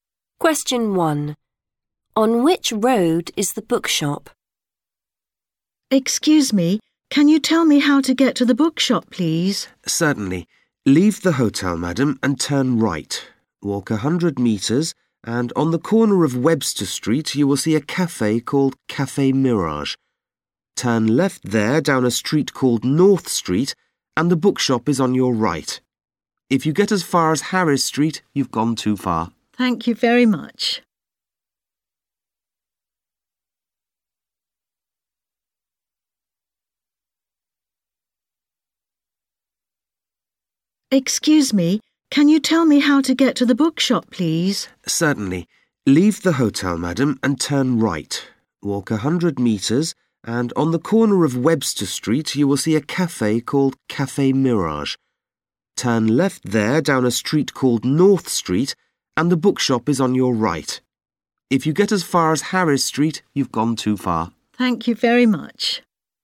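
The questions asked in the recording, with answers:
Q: On which road is the bookshop?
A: North Street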